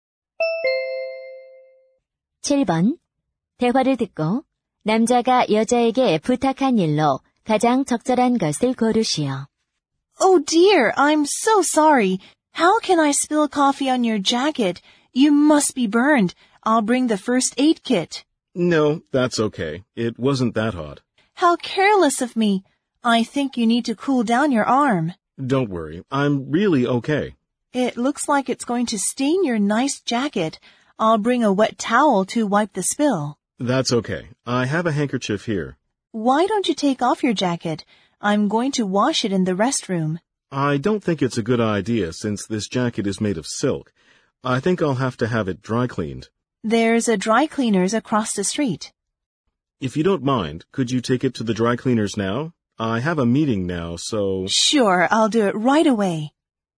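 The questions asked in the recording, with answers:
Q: 대화를 듣고 남자가 여자에게 부탁한 일로 가장 적절한 것을 고르시오.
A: 재킷을 세탁소에 맡기기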